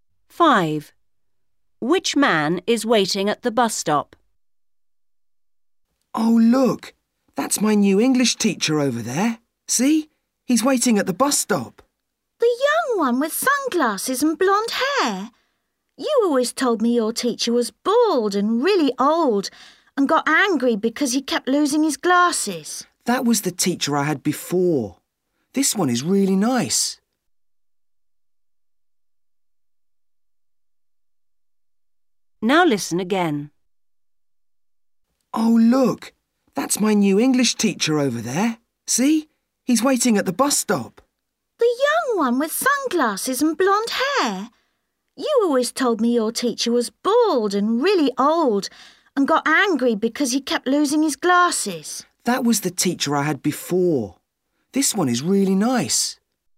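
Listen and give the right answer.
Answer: the young one with sunglasses and blonde hair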